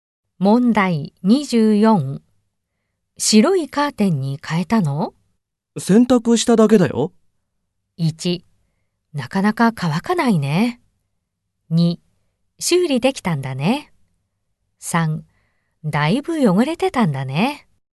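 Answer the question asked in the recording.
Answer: 3: だいぶ汚れてたんだね。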